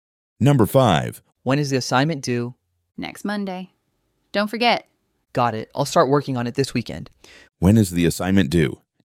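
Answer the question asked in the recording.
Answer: Next Monday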